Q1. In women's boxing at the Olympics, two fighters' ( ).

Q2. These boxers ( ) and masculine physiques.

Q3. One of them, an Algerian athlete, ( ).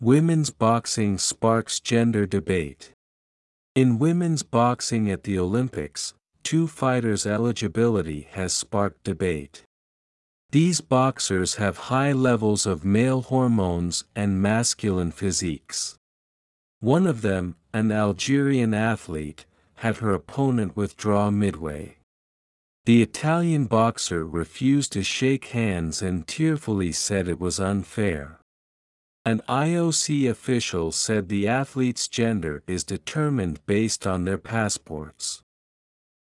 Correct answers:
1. eligibility has sparked debate
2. have high levels of male hormones
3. had her opponent withdraw midway

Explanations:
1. ⇒「sparked」の後に「in」や「to」を入れている人もいましたが、他動詞なので目的語の名詞「debate」の前に前置詞は入りません。
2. ⇒ 可算名詞は無冠詞単数にはなりません。また、複数形を示す語尾の [z] は消えずに発音される音です。

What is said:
Women's Boxing Sparks Gender Debate
In women's boxing at the Olympics, two fighters' eligibility has sparked debate.
These boxers have high levels of male hormones and masculine physiques.
One of them, an Algerian athlete, had her opponent withdraw midway.
The Italian boxer refused to shake hands and tearfully said it was unfair.
An IOC official said the athletes' gender is determined based on their passports.